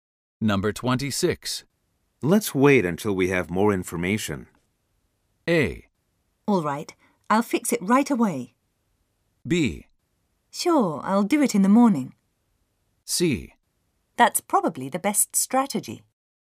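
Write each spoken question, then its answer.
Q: Let's wait until we have more information.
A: C: That's probably the best strategy.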